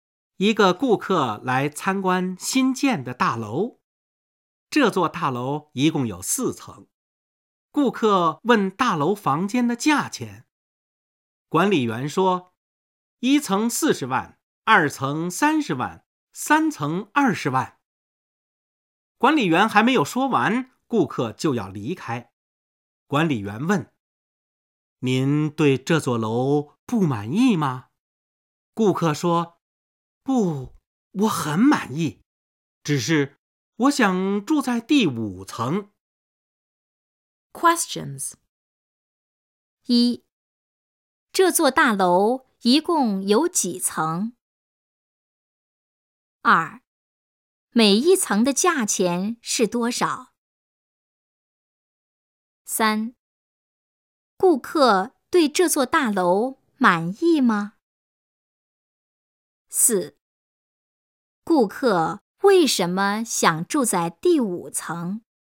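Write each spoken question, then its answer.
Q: 这座大楼一共有几层?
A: 四层

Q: 顾客对这座大楼满意吗?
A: 很满意

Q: 顾客为什么想住在第五层?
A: 因为越高越便宜,第五层就不要钱了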